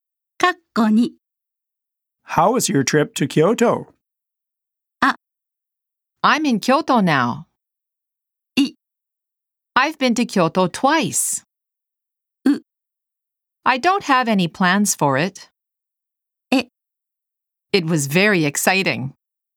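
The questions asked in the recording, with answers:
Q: How was your trip to Kyoto?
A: E: It was very exciting.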